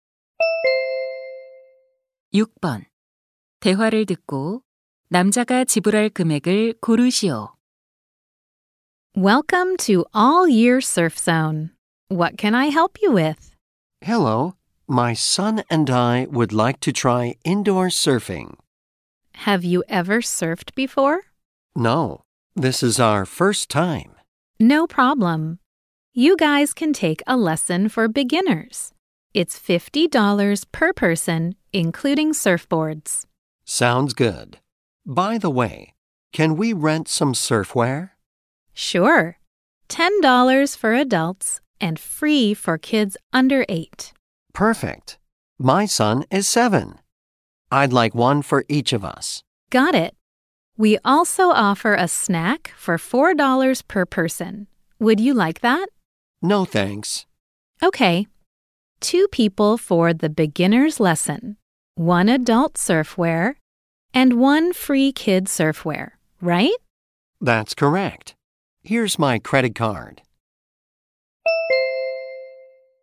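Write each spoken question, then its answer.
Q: 대화를 듣고 남자가 지불할 금액을 고르시오.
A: $110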